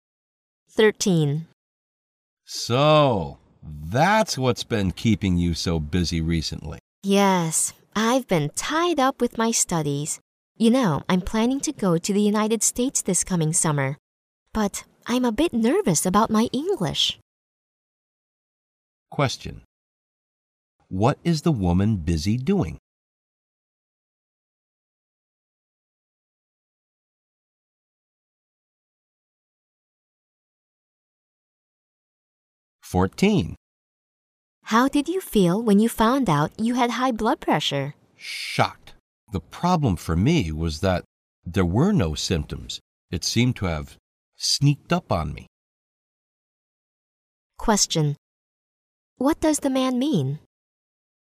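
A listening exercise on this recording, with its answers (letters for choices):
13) What is the woman busy doing?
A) Packing up to go abroad.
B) Brushing up on her English.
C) Drawing up a plan for her English course.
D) Applying for a visa to the United States.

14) What does the man mean?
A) He is anxious to find a cure for his high blood pressure.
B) He doesn't think high blood pressure is a problem for him.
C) He was not aware of his illness until diagnosed with it.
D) He did not take the symptoms of his illness seriously.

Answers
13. B
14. C

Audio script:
M: So, that's what's been keeping you so busy recently!
W: Yes, I've been tied up with my studies. You know I'm planning to go to the United States this coming summer, but I'm a bit nervous about my English.
Q: What is the woman busy doing?
W: How did you feel when you found out you had high blood pressure?
M: Shocked! The problem for me was that there no symptoms; it seemed to have sneaked up on me.
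Q: What does the man mean?

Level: 六级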